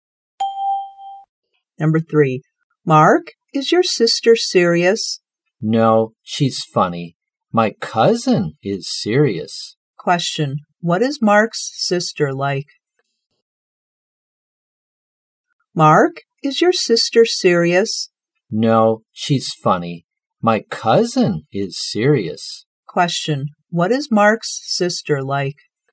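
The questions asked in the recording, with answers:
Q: What is Mark's sister like?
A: Funny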